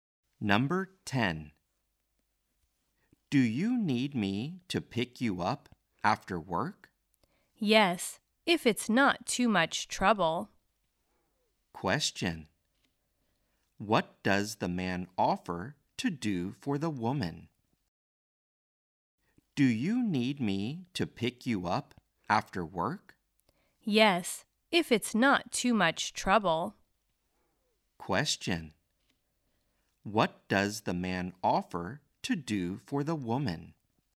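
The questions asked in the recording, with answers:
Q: what does the man offer to do for the woman?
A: Pick her up after work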